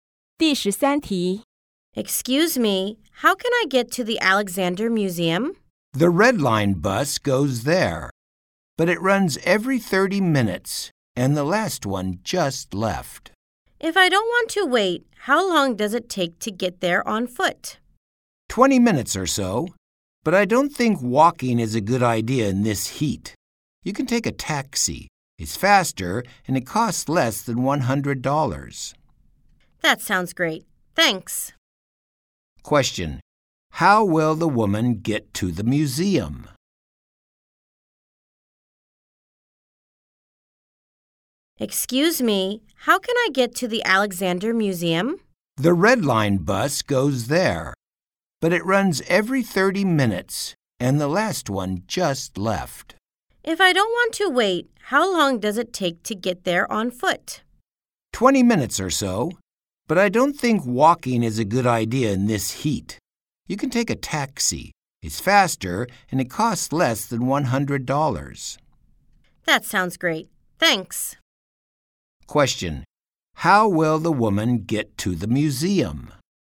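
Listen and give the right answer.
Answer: By taxi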